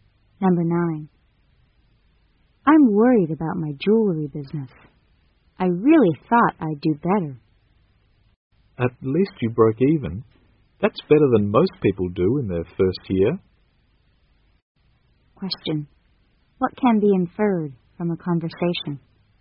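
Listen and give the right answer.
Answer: The business made no profit but no loss in its first year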